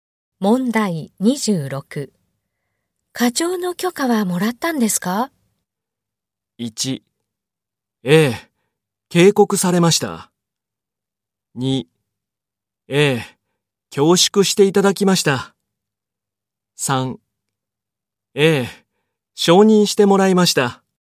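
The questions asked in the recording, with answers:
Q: 課長の許可はもらったんですか?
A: 3: ええ、承認してもらいました。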